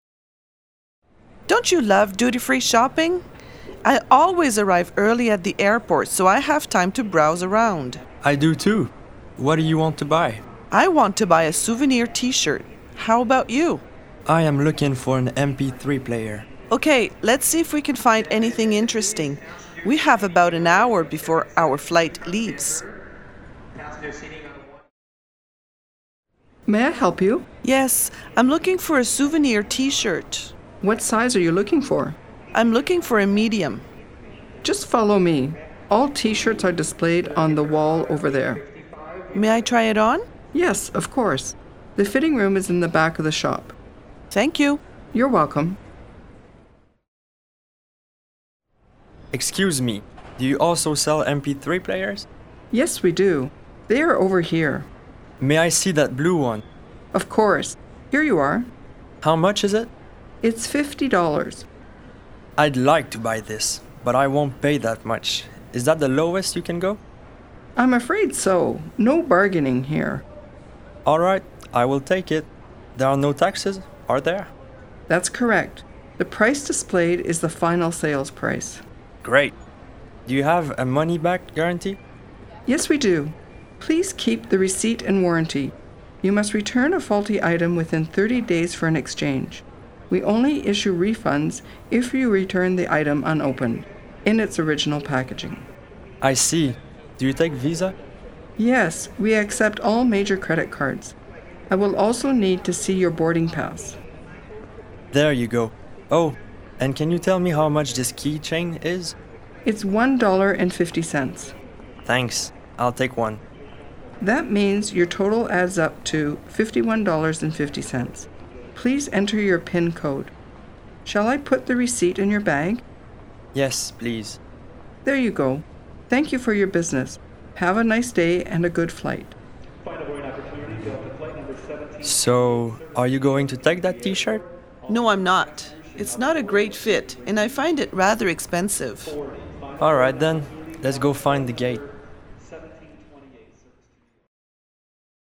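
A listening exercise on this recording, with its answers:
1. What do the customers buy?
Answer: An MP3 player and a keychain

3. What's the price of the MP3 player?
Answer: $50

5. How does the customer pay?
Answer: By credit card (Visa)

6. What happens with the receipt?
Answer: It is put in her bag

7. What will the two ladies do next?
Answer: Go and find the gate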